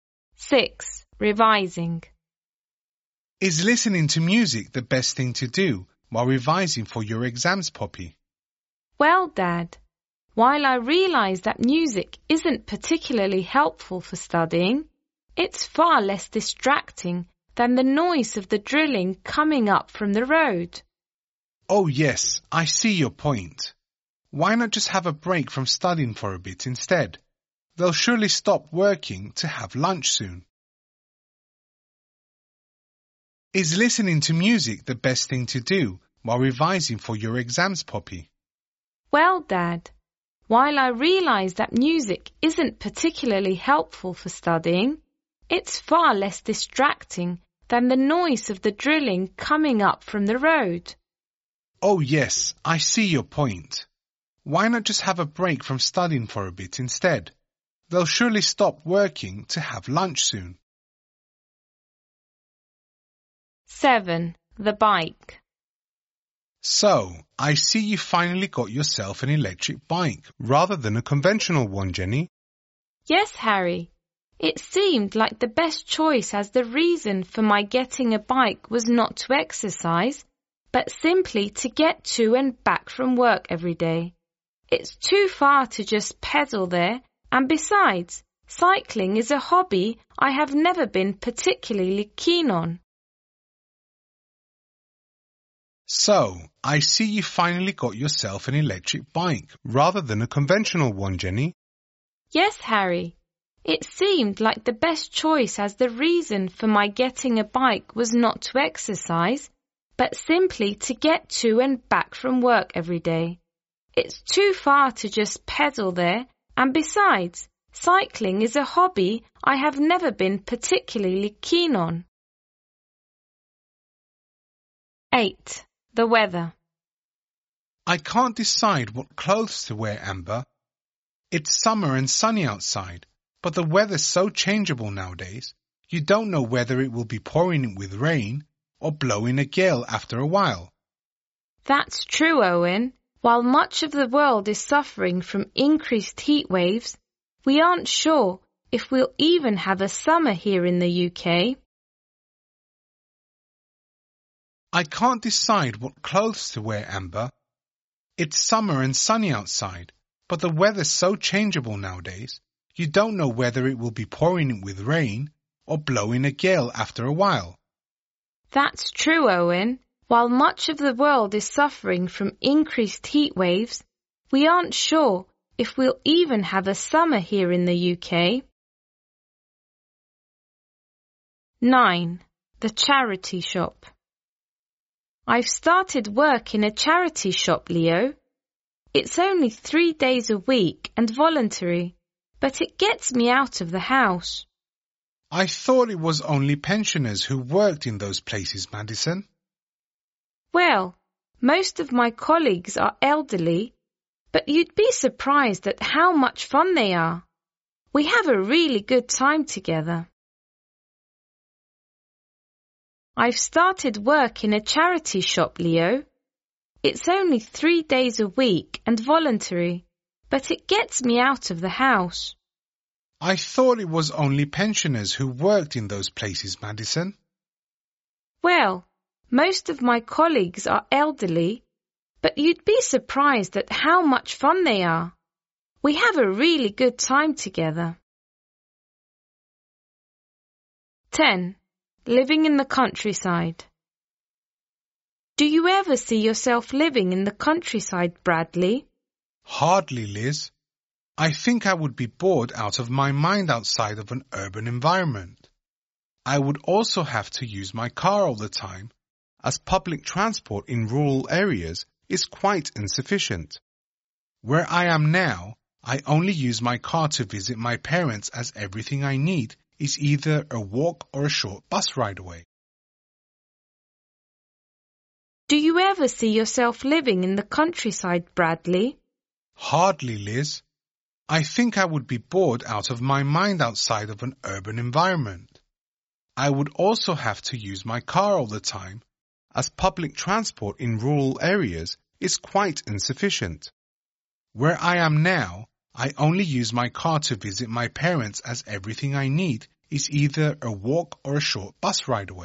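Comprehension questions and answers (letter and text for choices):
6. Why is Poppy listening to music?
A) She thinks it facilitates her studies.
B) She wants to drown out a disturbing noise.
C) She is taking a break from revising.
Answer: B) She wants to drown out a disturbing noise.

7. Jenny tells Harry that she purchased an electric bike in order to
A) get fit.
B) take up a new hobby.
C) commute to work.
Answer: C) commute to work.

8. Regarding the local weather, Amber and Owen agree that it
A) has become more unpredictable.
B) now results in longer summers.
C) is getting significantly hotter.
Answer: A) has become more unpredictable.

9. From what you hear about Madison, you understand that she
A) works full-time at the charity shop.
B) gets paid for her work at the charity shop.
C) gets on with her colleagues at the charity shop.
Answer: C) gets on with her colleagues at the charity shop.

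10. What does Bradley say about living in the countryside?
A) It is something he would find stimulating.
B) It would mean depending on his car too much.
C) It would be easier for him to use public transport.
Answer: B) It would mean depending on his car too much.

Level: Advanced (C1)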